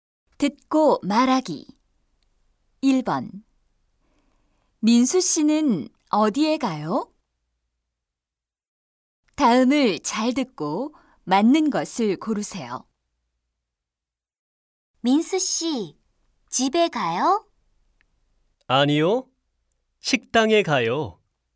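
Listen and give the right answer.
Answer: 식당에 가요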